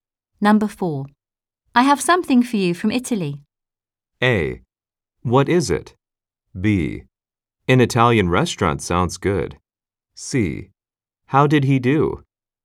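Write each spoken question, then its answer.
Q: I have something for you from Italy.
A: A: What is it?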